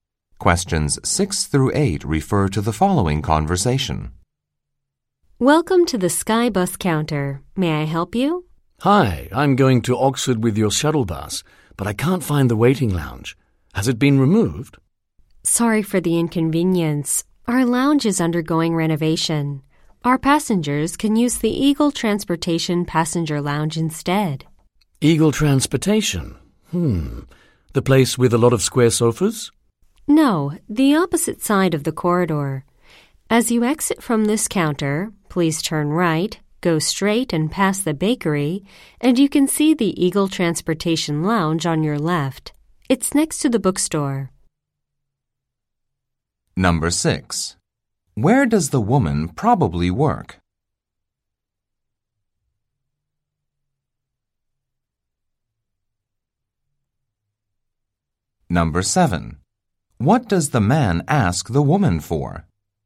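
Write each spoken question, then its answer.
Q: Where does the woman probably work?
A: At a shuttle bus company (the Skybus counter)

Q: What does the man ask the woman for?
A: Where the shuttle bus waiting lounge is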